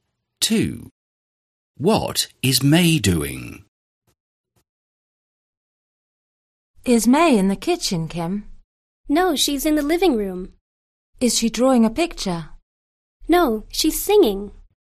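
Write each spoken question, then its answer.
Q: What is May doing?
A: Singing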